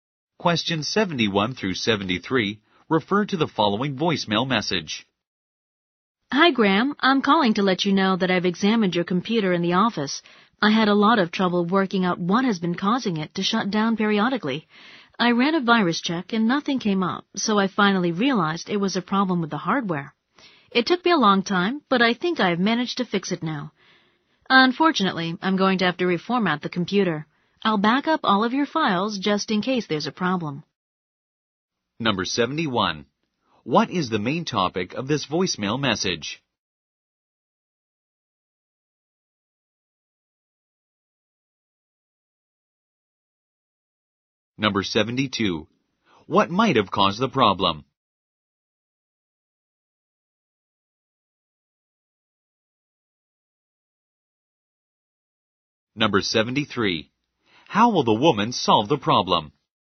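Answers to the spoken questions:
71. A computer problem
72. A hardware problem
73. By reformatting the computer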